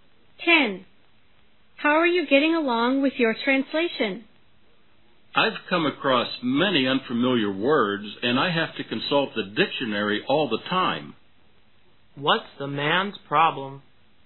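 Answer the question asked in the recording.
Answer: He meets many unfamiliar words and has to consult the dictionary all the time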